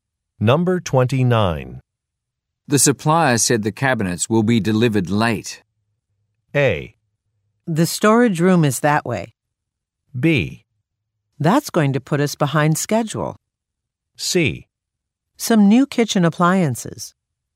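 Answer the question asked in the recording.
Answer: B: That's going to put us behind schedule.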